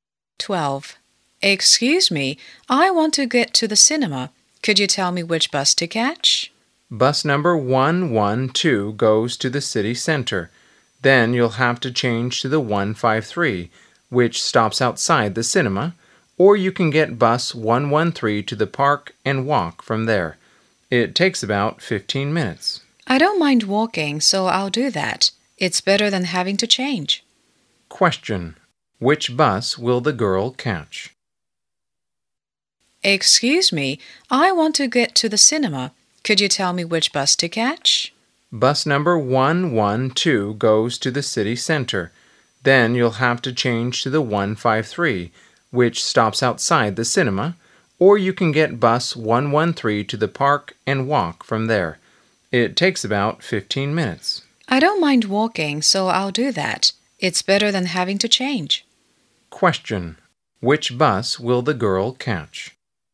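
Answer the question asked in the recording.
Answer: Bus 113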